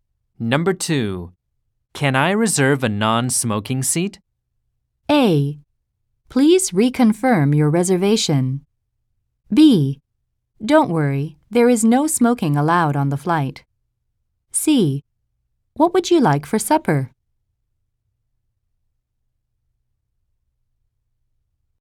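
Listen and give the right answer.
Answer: B: Don't worry, there is no smoking allowed on the flight.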